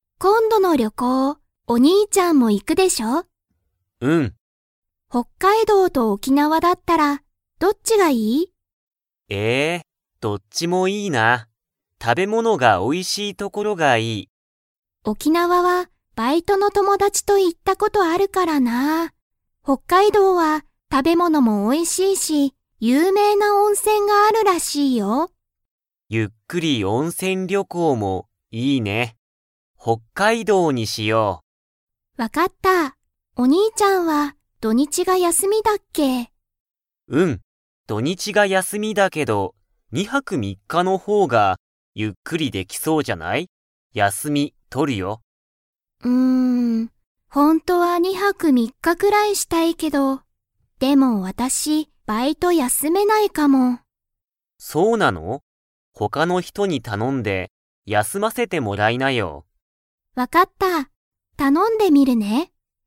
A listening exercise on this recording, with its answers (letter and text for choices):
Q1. 二人ふたりは、どこに旅行りょこうに行いきますか?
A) 沖縄おきなわ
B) 北海道ほっかいどう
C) 東京とうきょう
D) 外国がいこく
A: B) 北海道ほっかいどう

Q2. 妹いもうとは、バイトを 。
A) 絶対ぜったいに休やすめる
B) 休やすめないかもしれない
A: B) 休やすめないかもしれない

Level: Level 4